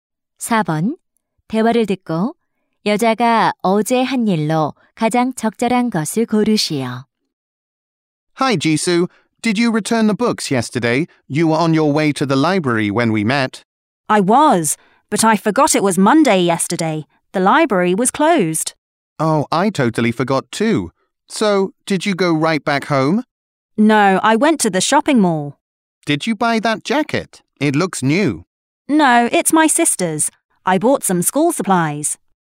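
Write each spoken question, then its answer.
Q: 대화를 듣고 여자가 어제 한 일로 가장 적절한 것을 고르시오.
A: 학용품 구입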